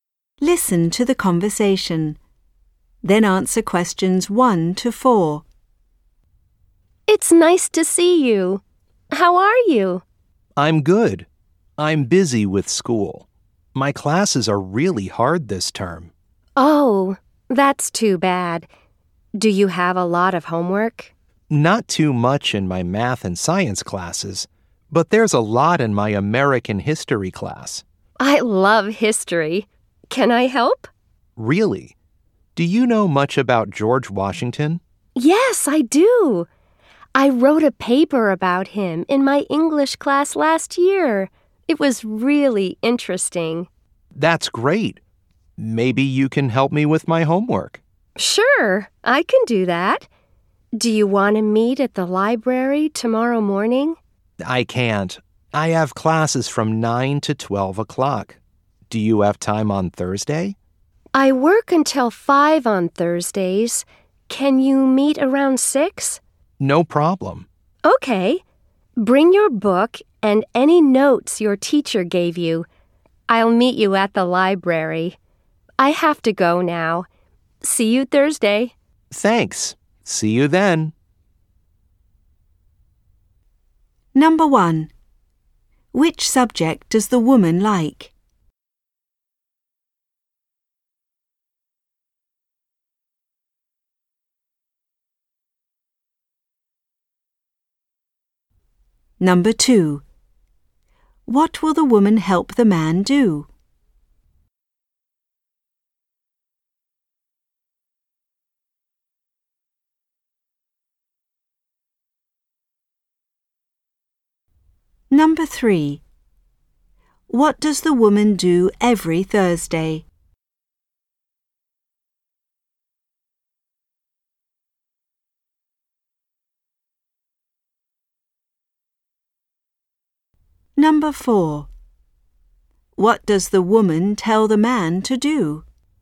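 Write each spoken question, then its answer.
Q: Which subject does the woman like?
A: History

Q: What will the woman help the man do?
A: His American history homework (about George Washington)

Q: What does the woman do every Thursday?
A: She works until 5

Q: What does the woman tell the man to do?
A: Bring his book and his teacher's notes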